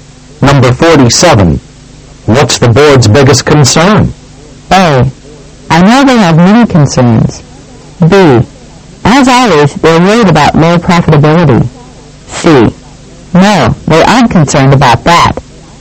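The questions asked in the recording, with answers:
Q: What's the board's biggest concern?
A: B: As always, they're worried about low profitability.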